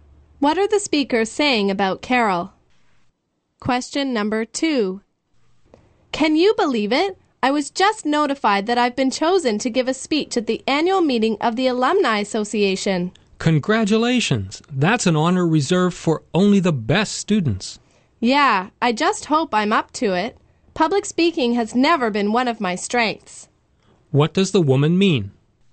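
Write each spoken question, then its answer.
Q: What does the woman mean?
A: She is worried that she is not good at public speaking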